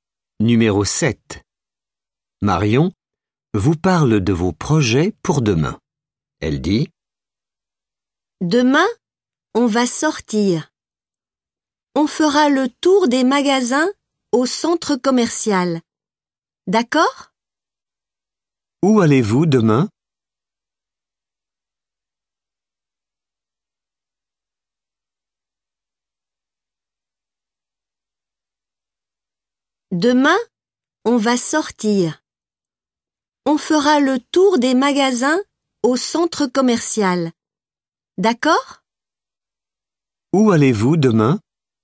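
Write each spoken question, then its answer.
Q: Où allez-vous demain?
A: Au centre commercial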